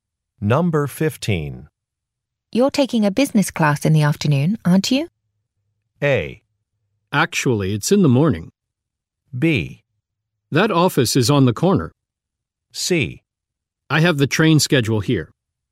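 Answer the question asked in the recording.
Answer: A: Actually, it's in the morning.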